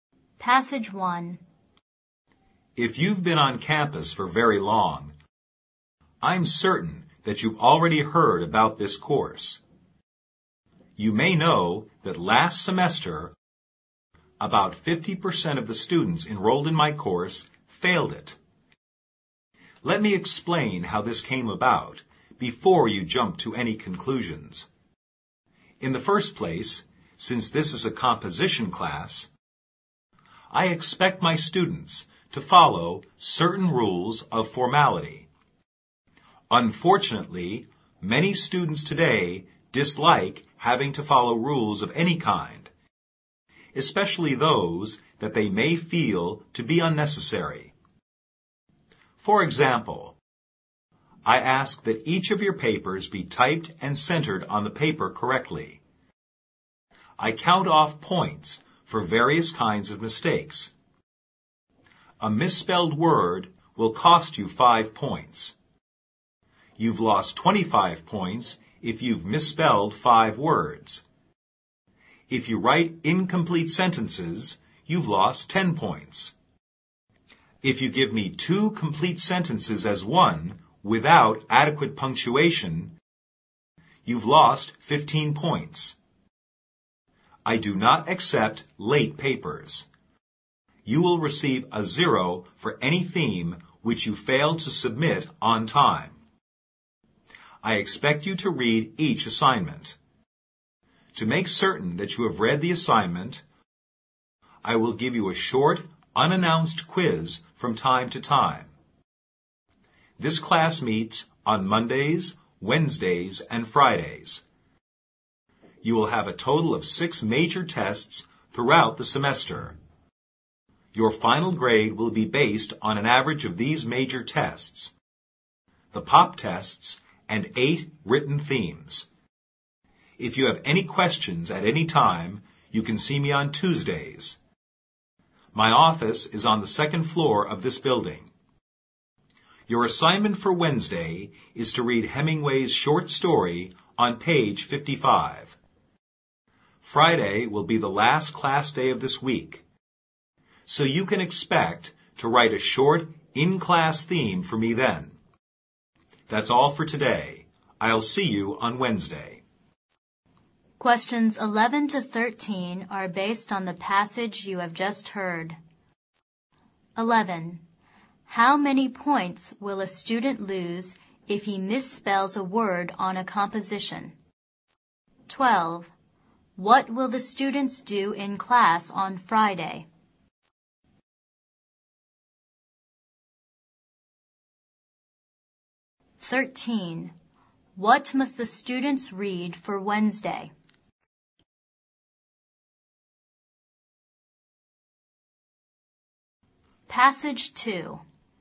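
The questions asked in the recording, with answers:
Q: How many points will a student lose if he misspells a word on a composition?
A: 5 points

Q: What will the students do in class on Friday?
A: Write a short in-class theme

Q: What must the students read for Wednesday?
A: Hemingway's short story on page 55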